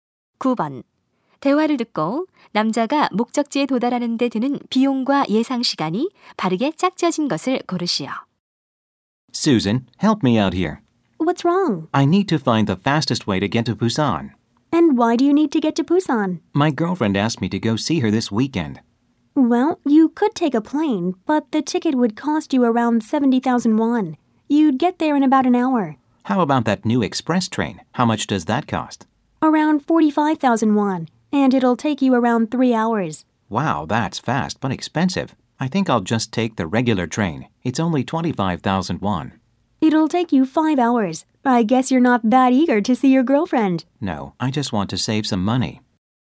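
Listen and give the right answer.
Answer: 25,000원 - 5시간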